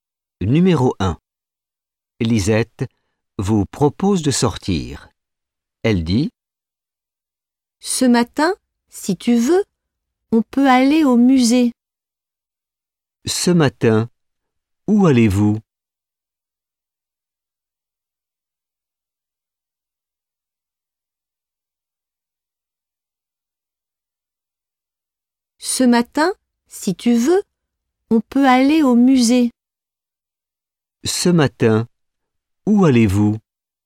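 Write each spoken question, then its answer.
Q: « Ce matin, où allez-vous ? »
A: Au musée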